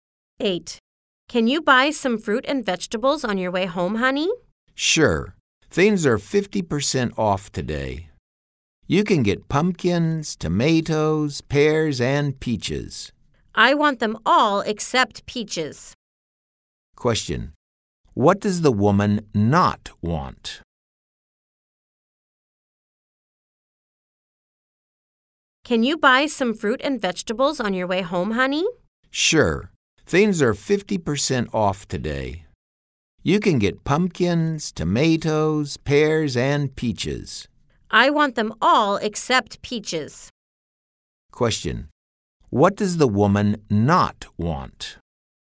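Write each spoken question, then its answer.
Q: Question. What does the woman not want?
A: Peaches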